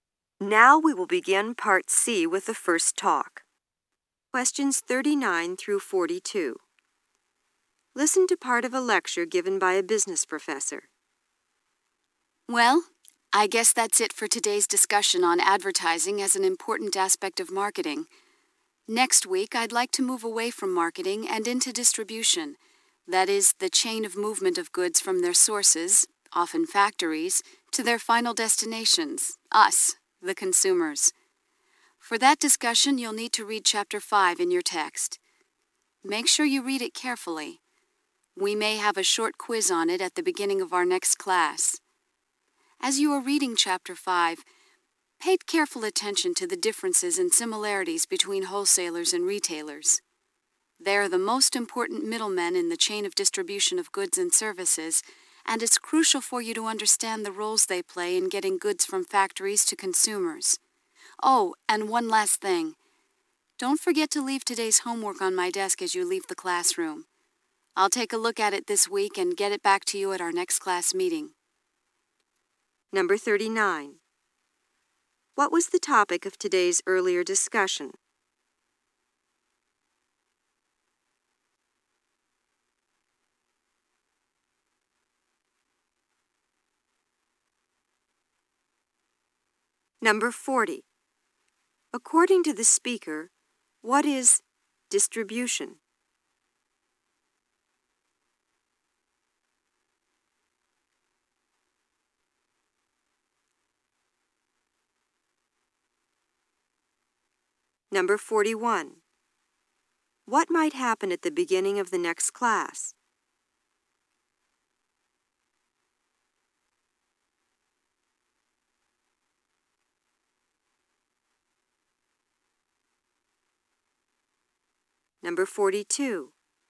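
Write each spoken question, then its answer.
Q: What was the topic of today's earlier discussion?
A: Advertising as an aspect of marketing

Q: According to the speaker, what is distribution?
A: The movement of goods from their sources to consumers

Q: What might happen at the beginning of the next class?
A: A short quiz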